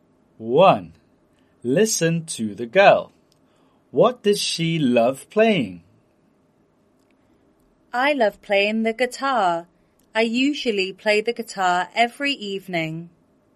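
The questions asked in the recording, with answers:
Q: What does she love playing?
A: The guitar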